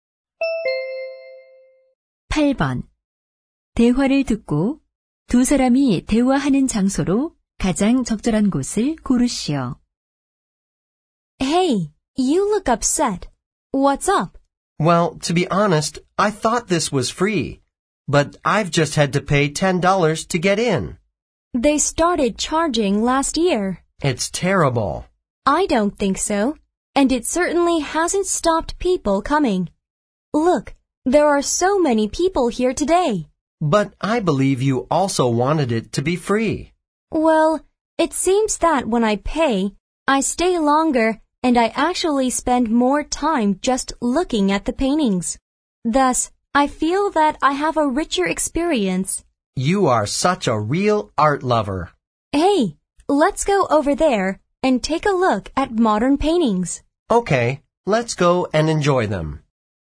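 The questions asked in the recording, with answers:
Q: 대화를 듣고 두 사람이 대화하는 장소로 가장 적절한 곳을 고르시오.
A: 미술관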